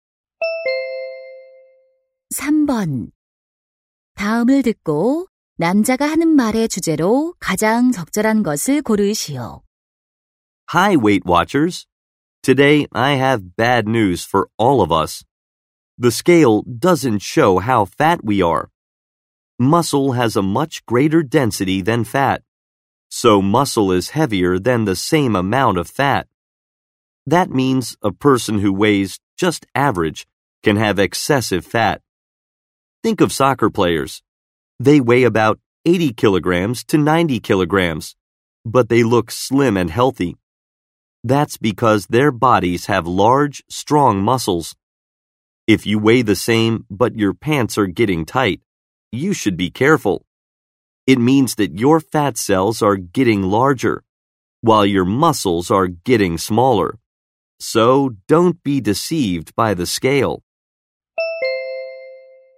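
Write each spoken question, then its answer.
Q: 다음을 듣고 남자가 하는 말의 주제로 가장 적절한 것을 고르시오.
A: 체중계 숫자만으로는 체지방을 알 수 없다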